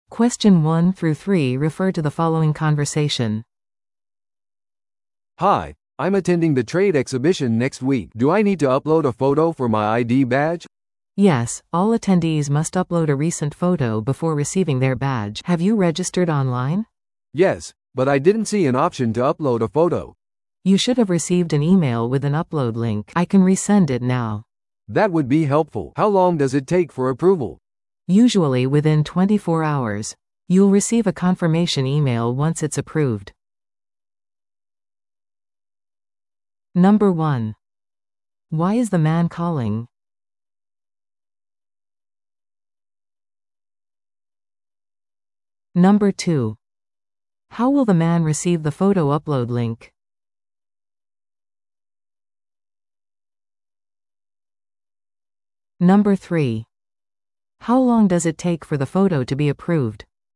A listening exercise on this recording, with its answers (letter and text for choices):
Listen to the audio below and answer the questions.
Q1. Why is the man calling?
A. イベントのスケジュールを確認するため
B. 写真のアップロードについて尋ねるため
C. 返金を依頼するため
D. 登録を確認するため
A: B. 写真のアップロードについて尋ねるため

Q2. How will the man receive the photo upload link?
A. 電話で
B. メールで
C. アカウントにログインして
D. 郵送で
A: B. メールで

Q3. How long does it take for the photo to be approved?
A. 1時間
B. 12時間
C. 24時間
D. 3日間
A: C. 24時間

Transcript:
A: "Hi, I'm attending the trade exhibition next week. Do I need to upload a photo for my ID badge?"
B: "Yes, all attendees must upload a recent photo before receiving their badge. Have you registered online?"
A: "Yes, but I didn't see an option to upload a photo."
B: "You should have received an email with an upload link. I can resend it now."
A: "That would be helpful. How long does it take for approval?"
B: "Usually within 24 hours. You'll receive a confirmation email once it's approved."